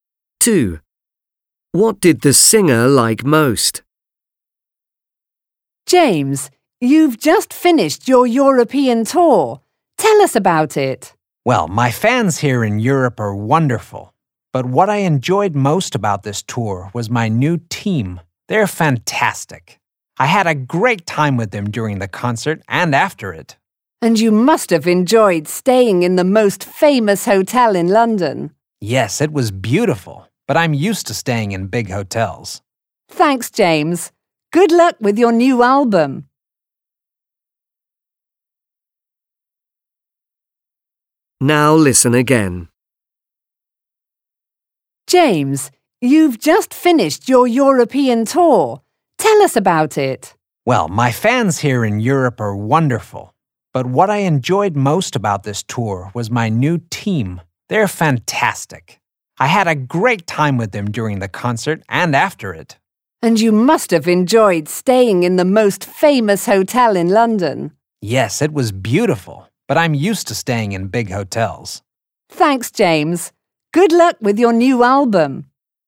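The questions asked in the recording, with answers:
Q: What did the singer like most?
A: His new team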